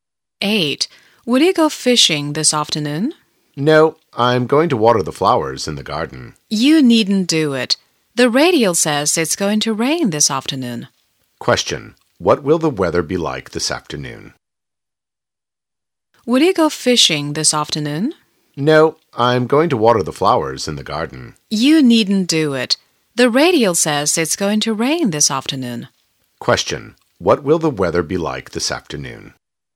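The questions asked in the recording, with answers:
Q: What will the weather be like this afternoon?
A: It's going to rain.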